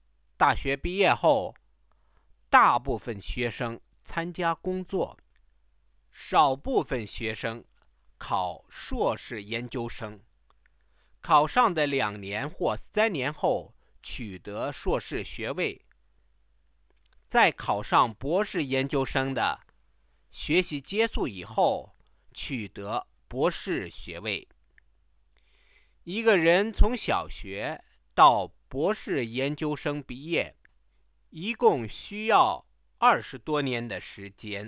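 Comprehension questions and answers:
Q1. What do Chinese undergraduates do after finishing their courses?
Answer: Most of them start working; a small number take the entrance exam for a master's degree, which takes two or three years, and some then go on to a doctorate.

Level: 2nd year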